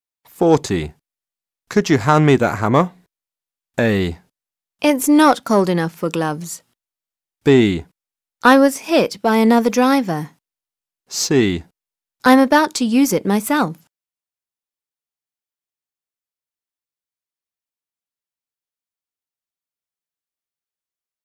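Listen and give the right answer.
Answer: C: I'm about to use it myself.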